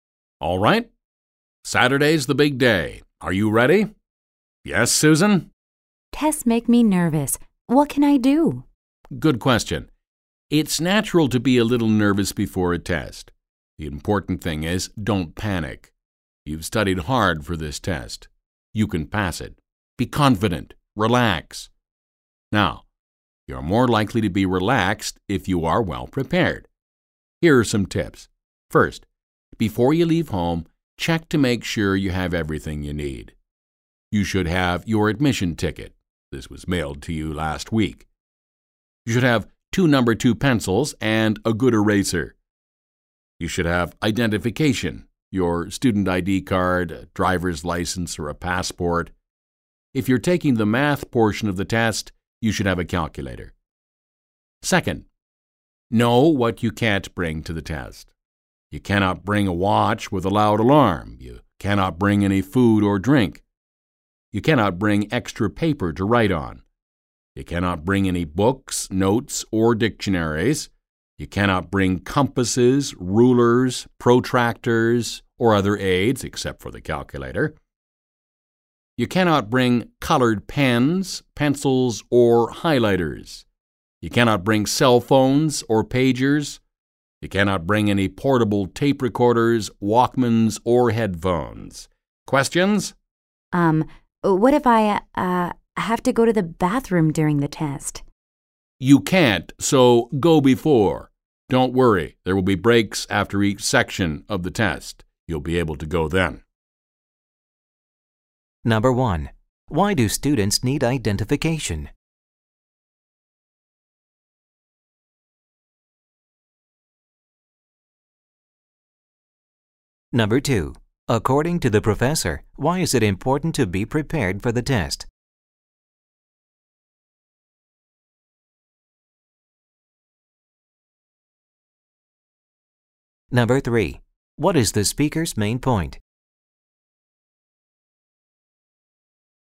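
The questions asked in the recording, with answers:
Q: According to the professor, why is it important to be prepared for the test?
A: Being well prepared helps students stay relaxed during the test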